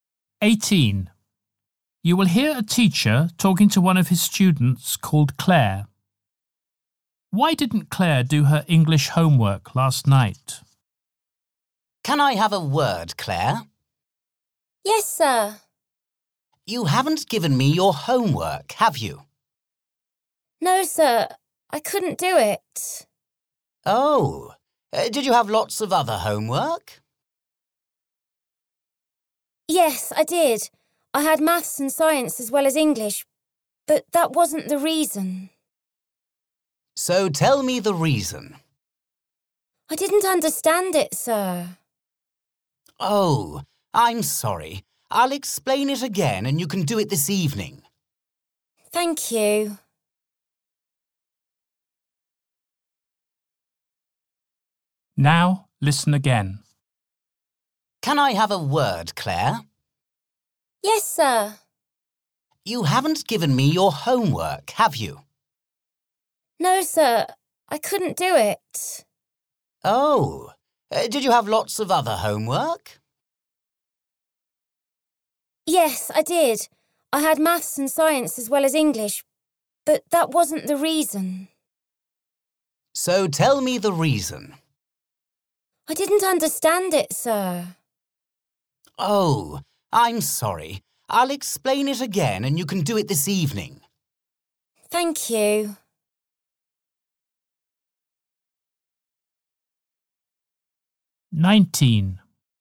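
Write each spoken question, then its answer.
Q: Why didn't Claire do her English homework last night?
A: She didn't understand it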